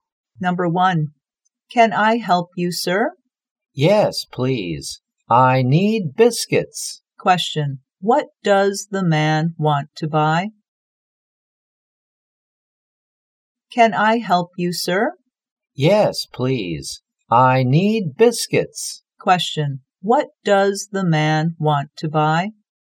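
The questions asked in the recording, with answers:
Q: what does the man want to buy?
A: Biscuits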